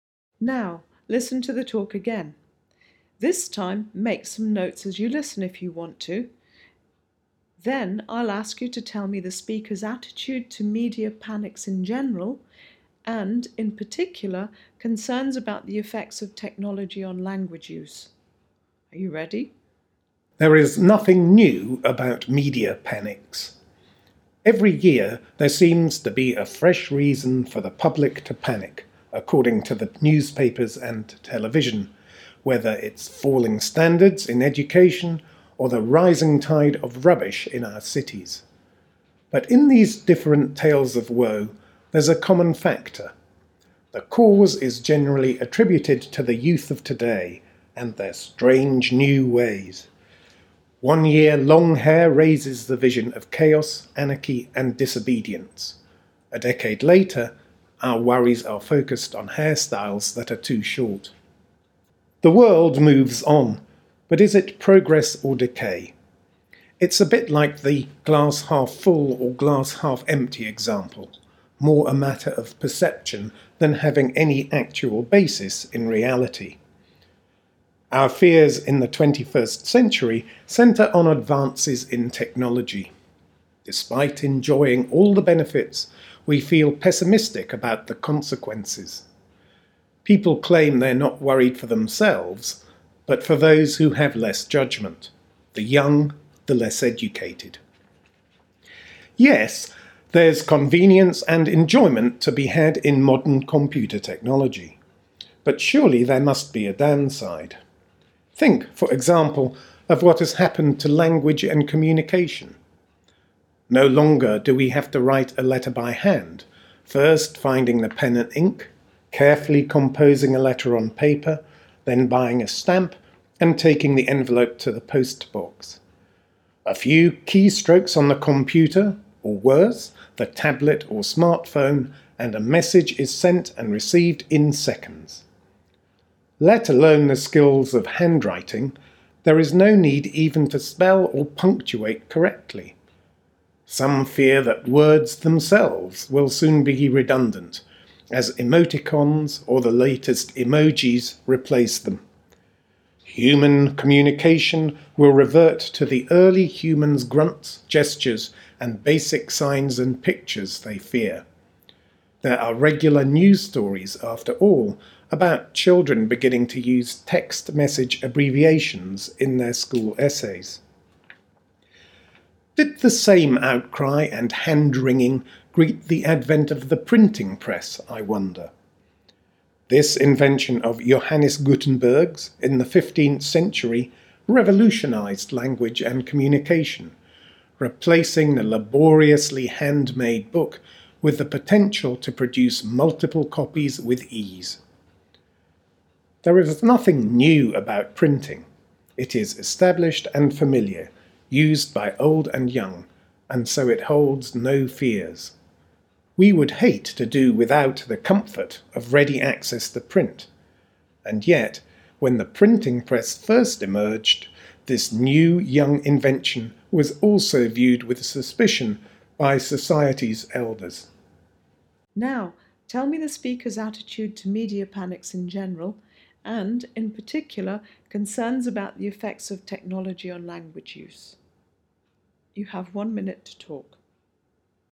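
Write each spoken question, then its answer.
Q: Now, tell me the speaker's attitude to media panics in general, and, in particular, concerns about the effects of technology on language use.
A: Sceptical: media panics are more a matter of perception than reality, and fears about technology harming language are like past fears about the printing press, which is now accepted.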